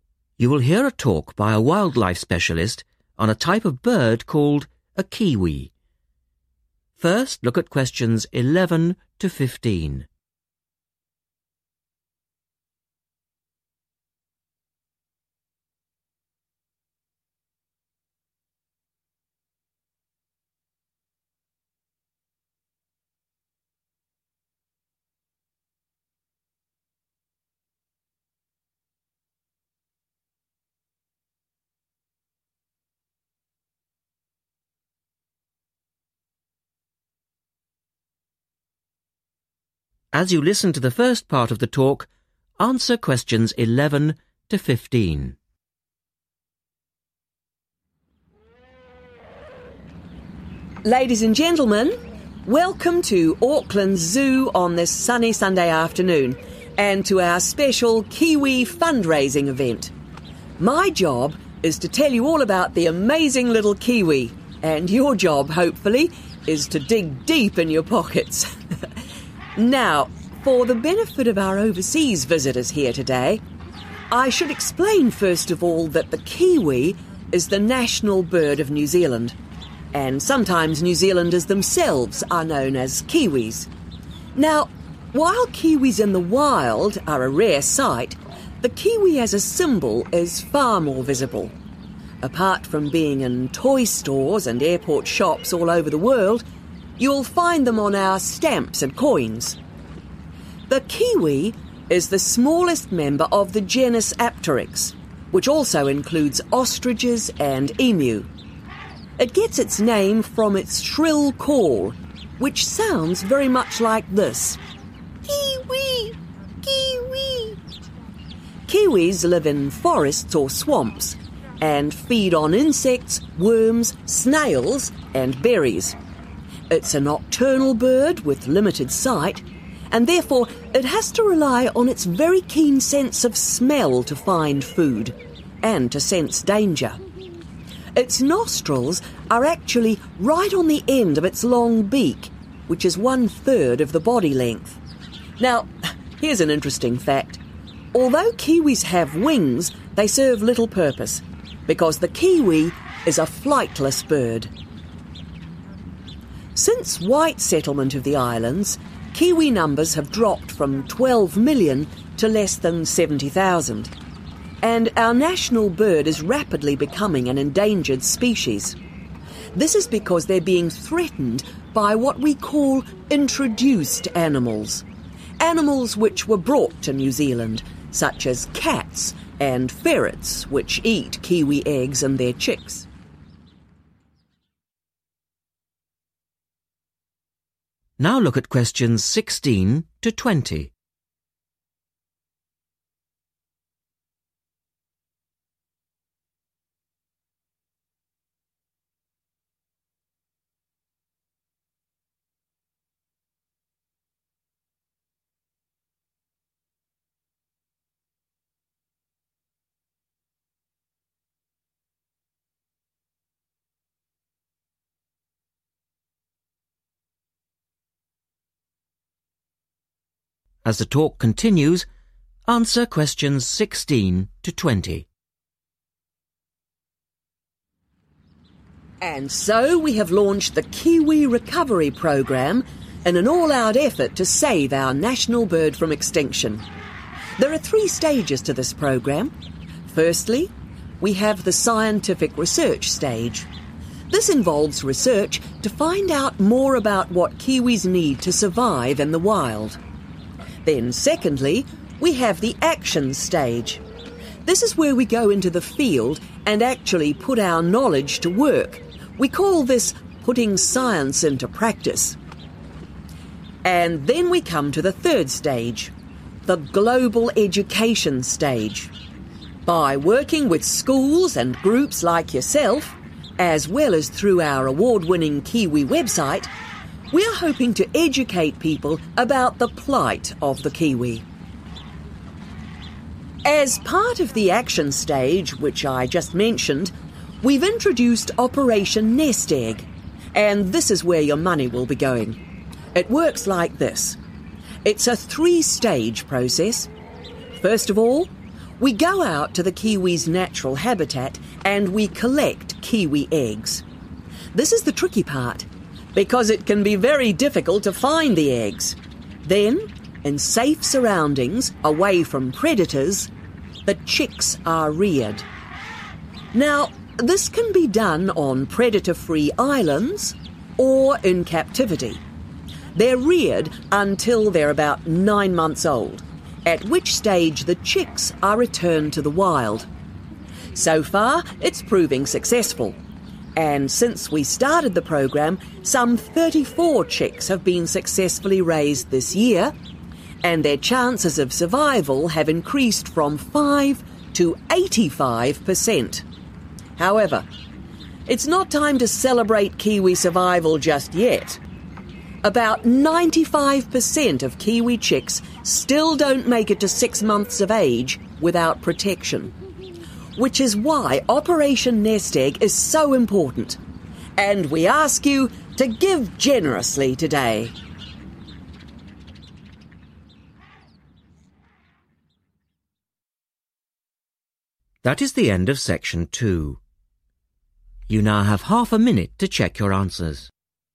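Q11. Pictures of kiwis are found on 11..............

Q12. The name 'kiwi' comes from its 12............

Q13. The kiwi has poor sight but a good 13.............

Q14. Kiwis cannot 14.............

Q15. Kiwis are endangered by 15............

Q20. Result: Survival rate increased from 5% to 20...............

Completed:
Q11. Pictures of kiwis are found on stamps and coins
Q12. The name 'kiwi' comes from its shrill call
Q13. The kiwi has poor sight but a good sense of smell
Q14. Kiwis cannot fly
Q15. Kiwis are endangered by introduced animals
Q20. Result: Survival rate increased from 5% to 85%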